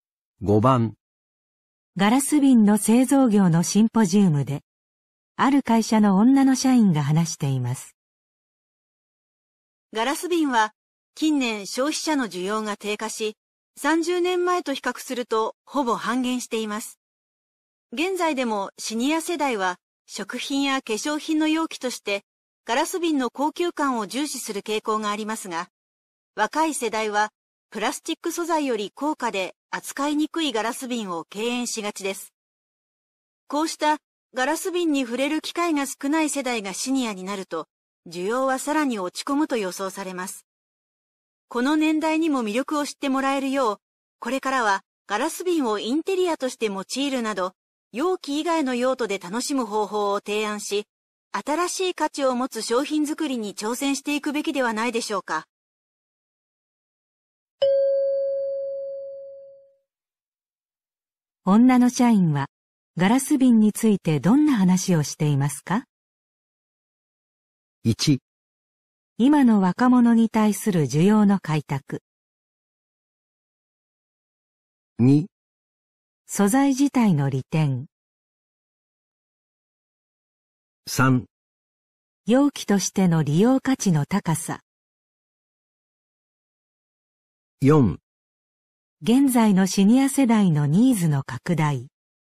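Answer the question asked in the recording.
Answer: 1: 今の若者に対する需要の開拓。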